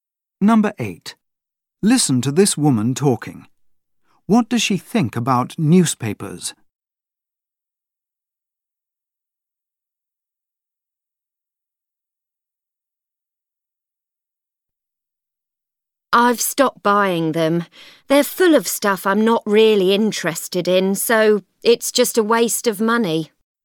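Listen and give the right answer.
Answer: They're a waste of money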